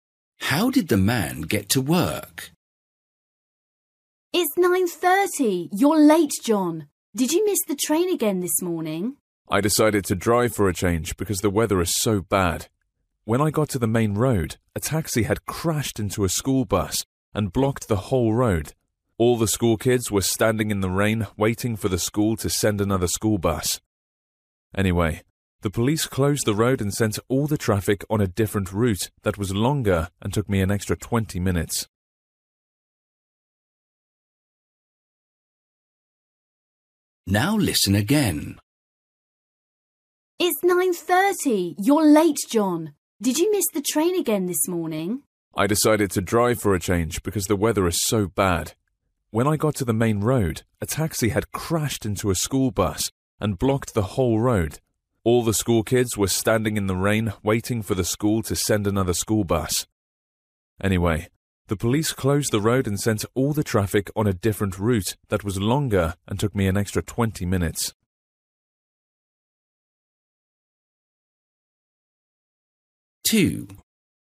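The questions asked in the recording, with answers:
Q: How did the man get to work?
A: He drove (by car).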